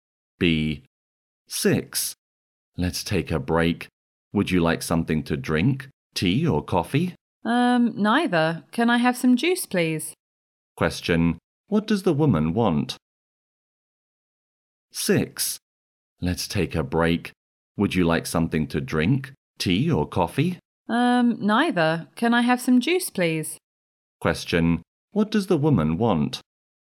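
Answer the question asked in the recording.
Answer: Juice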